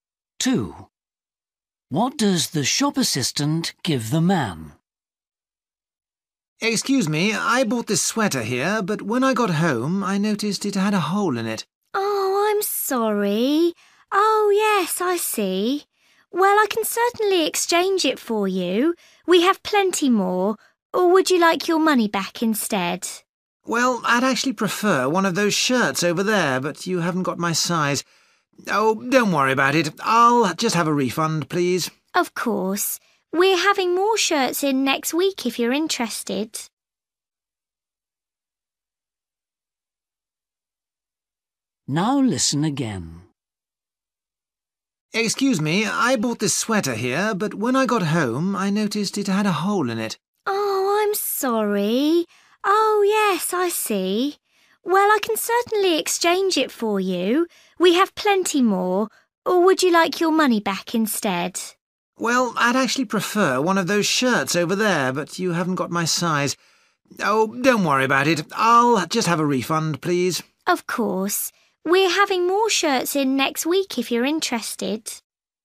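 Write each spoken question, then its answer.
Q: What does the shop assistant give the man?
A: a refund (his money back)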